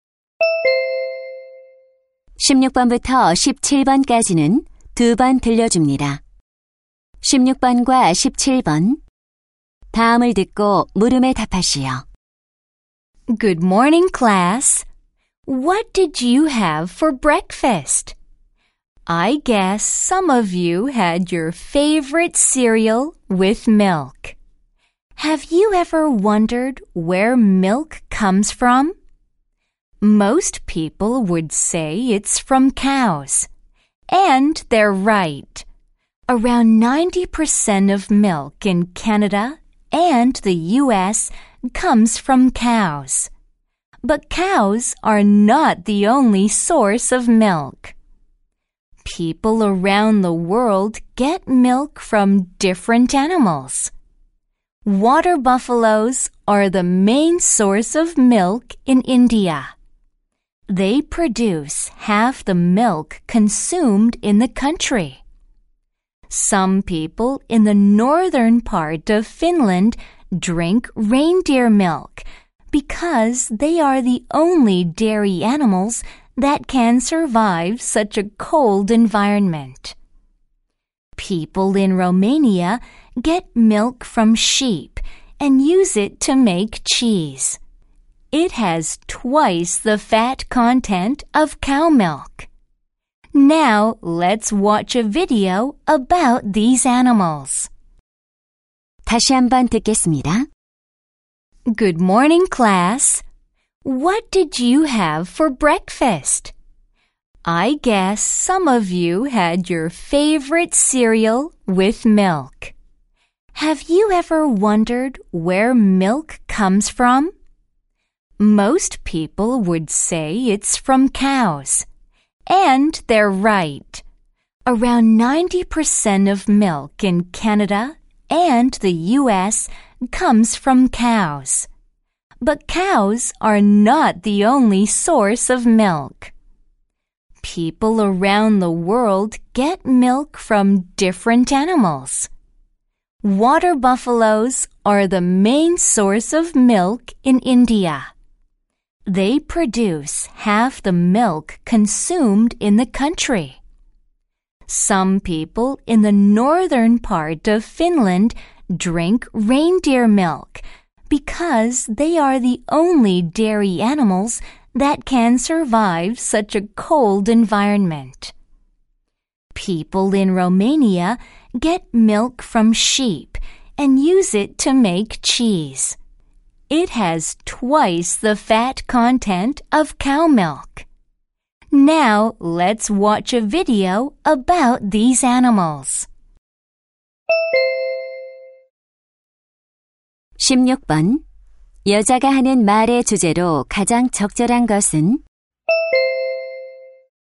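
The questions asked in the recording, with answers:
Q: 여자가 하는 말의 주제로 가장 적절한 것은?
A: 세계 여러 나라에서 우유를 얻는 다양한 동물들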